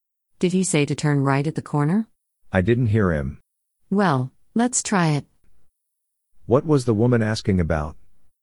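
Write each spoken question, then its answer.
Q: What was the woman asking about?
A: Whether he said to turn right at the corner.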